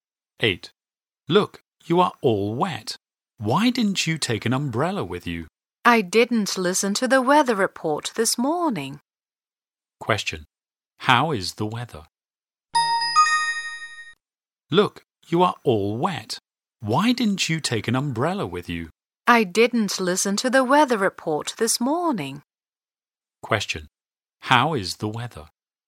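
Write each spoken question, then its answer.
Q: How is the weather?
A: It's rainy.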